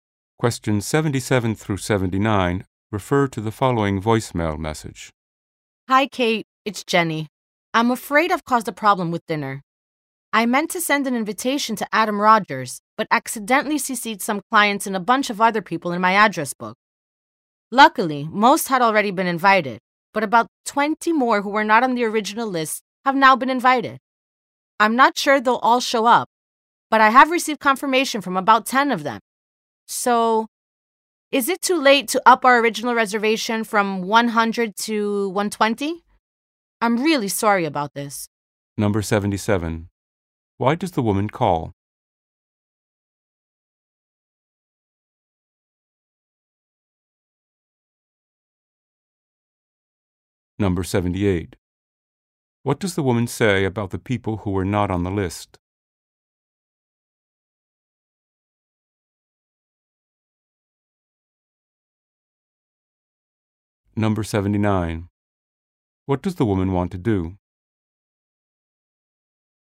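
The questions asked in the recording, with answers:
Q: Why does the woman call?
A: She accidentally invited extra people to the dinner

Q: What does the woman say about the people who were not on the list?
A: About 10 of them have confirmed

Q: What does the woman want to do?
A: Increase the reservation from 100 to 120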